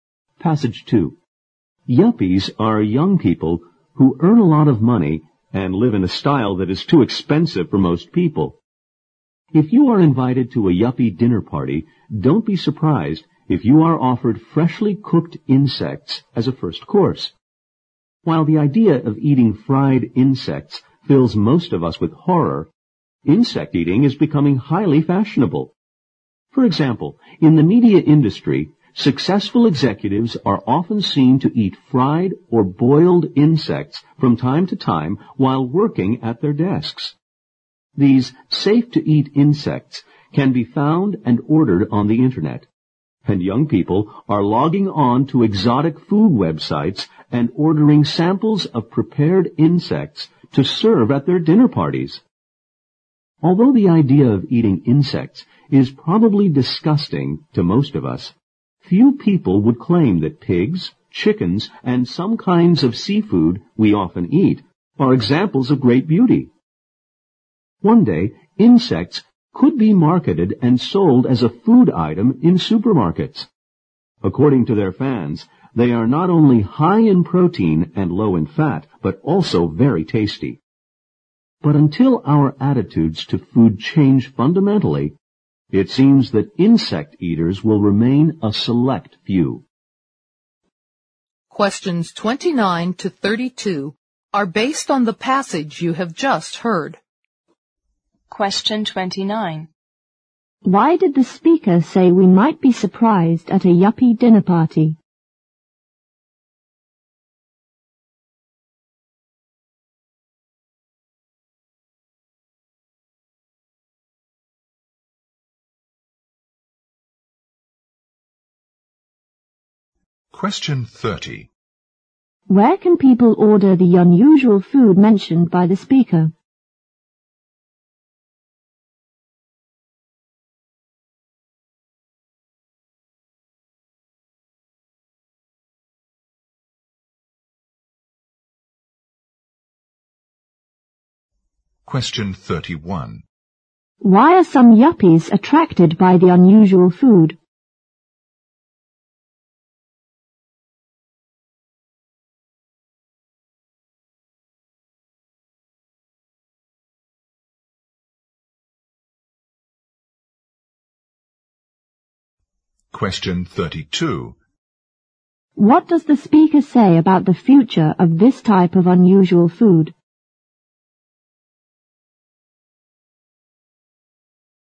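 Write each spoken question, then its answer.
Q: Why did the speaker say we might be surprised at a yuppie dinner party?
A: We might be offered freshly cooked insects as a first course.

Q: Where can people order the unusual food mentioned by the speaker?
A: On the Internet, from exotic food websites.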